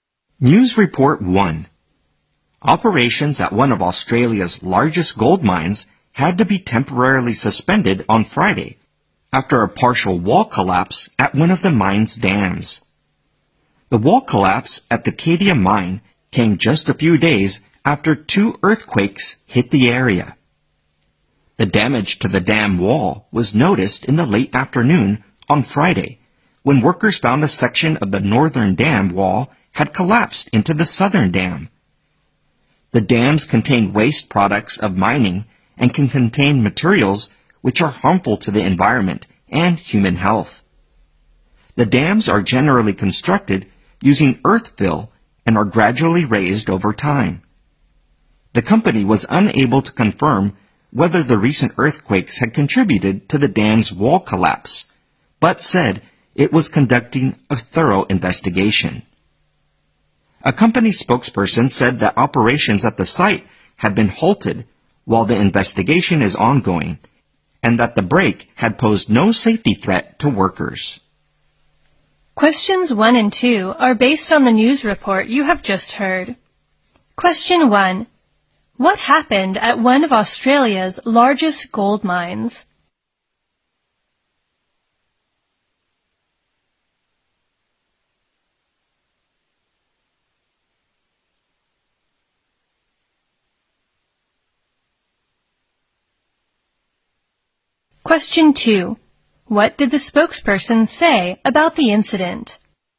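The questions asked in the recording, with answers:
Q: What happened at one of Australia's largest gold mines?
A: Part of a dam wall collapsed, so operations were temporarily suspended

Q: What did the spokesperson say about the incident?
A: The break posed no safety threat to workers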